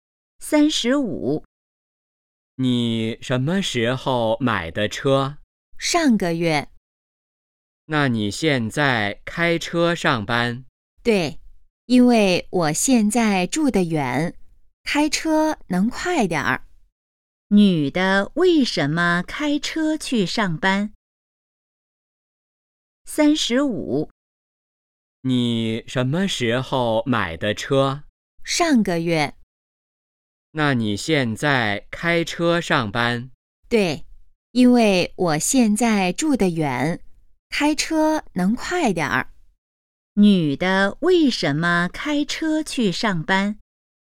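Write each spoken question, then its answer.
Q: 女的为什么开车去上班?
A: 因为住得远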